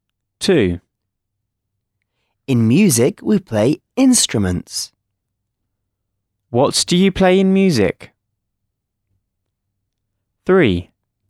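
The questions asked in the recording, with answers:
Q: What do you play in music?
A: instruments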